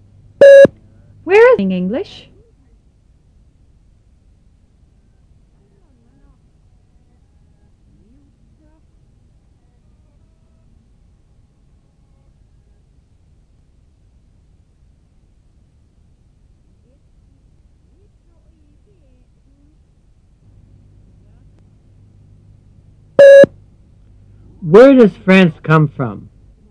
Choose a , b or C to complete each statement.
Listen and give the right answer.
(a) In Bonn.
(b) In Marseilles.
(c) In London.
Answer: (c) In London.